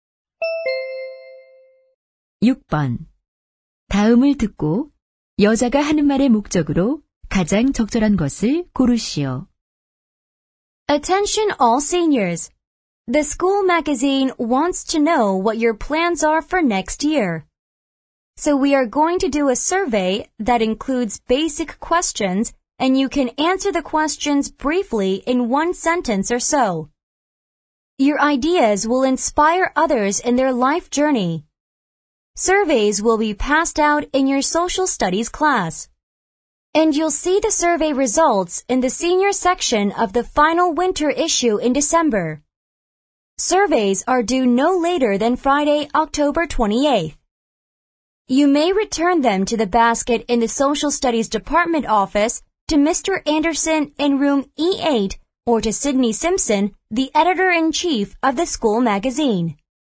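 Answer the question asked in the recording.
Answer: 졸업반 학생들에게 설문 조사 참여를 요청하려고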